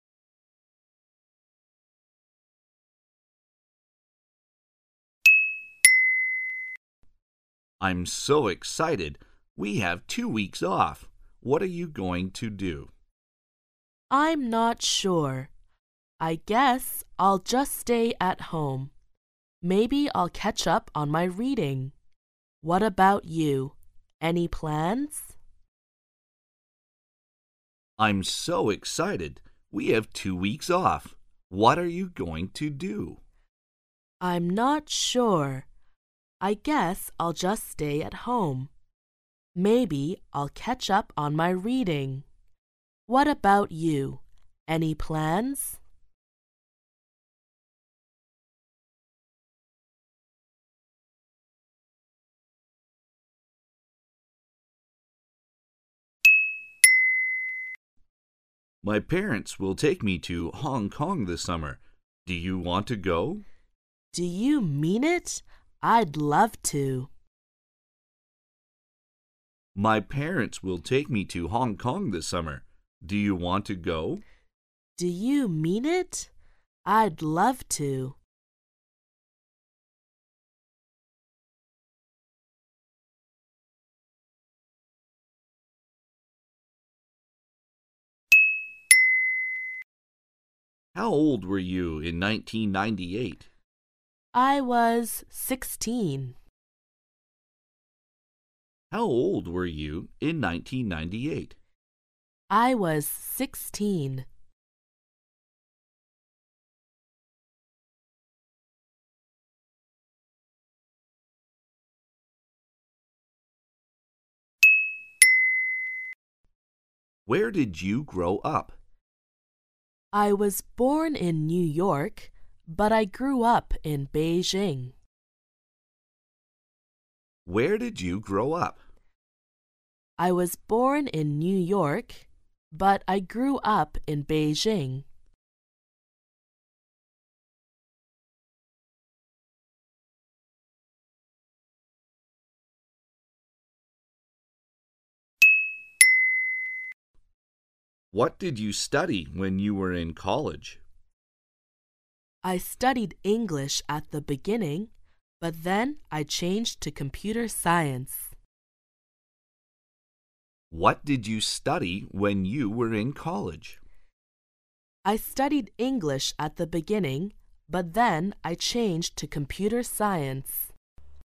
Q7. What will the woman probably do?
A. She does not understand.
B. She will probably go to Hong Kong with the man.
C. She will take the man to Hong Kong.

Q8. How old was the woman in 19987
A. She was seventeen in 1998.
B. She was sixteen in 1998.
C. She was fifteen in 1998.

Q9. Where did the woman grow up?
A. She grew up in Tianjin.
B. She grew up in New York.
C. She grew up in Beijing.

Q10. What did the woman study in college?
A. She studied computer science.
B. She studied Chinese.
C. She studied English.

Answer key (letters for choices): 7B, 8B, 9C, 10C

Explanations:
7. [听力原文] M: My parents will take me to Hong Kong this summer. Do you want to go? W: Do you mean it? I'd love to! Q: What will the woman probably do?
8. [听力原文] M: How old were you in 1998? W: I was sixteen. Q: How old was the woman in 1998? [句意] 1998年这位女士多大年纪?从 对话:"I was sixteen.""我那时16岁。"可以得出答案,她16岁。故选项[B]正 确。
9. [听力原文] M: Where did you grow up? W: I was born in New York, but I grew up in Beijing. Q: Where did the woman grow up? [句意] 这位女士在哪里长大?对话中, 女士回答说:"I was born in New York,but I grew up in Beijing.""我出生在 纽约,但是我在北京长大。"故选项[C]正确。
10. [听力原文] M: What did you study when you were in college? W: I studied English at the beginning, but then I changed to computer science. Q: What did the woman first study in college? [句意] 这位女士在大学首先 学的是什么?从对话"I studied English at the beginning,but then I changed to computer science.""一开始我学的是英语,但是后来我转成了计算机科 学。"我们得出答案,她首先读的是英语。故选项[C]正确。